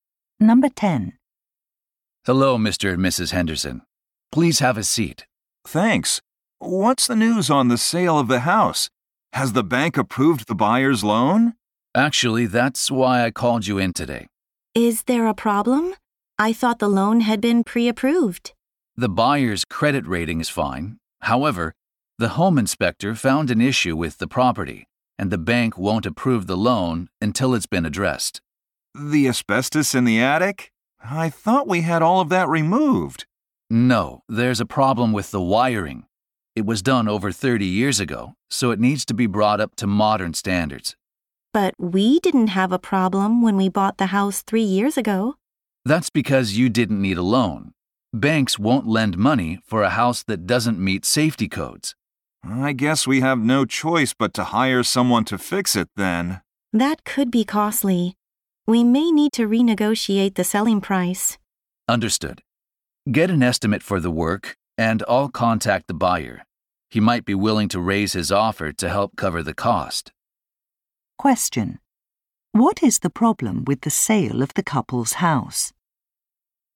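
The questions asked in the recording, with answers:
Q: What is the problem with the sale of the couple's house?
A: The house's old wiring doesn't meet safety codes, so the bank won't approve the buyer's loan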